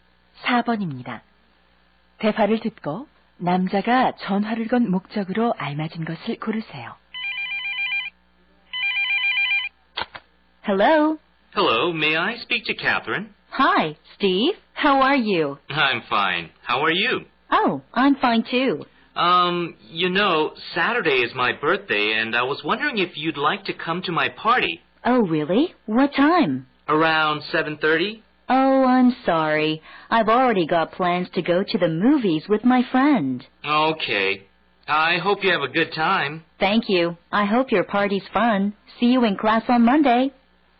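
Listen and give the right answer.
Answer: 생일 파티에 초대하려고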